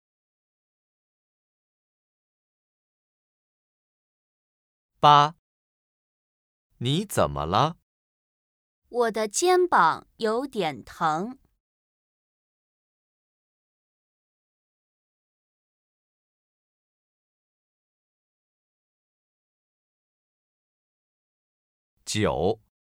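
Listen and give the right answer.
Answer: 肩膀有点疼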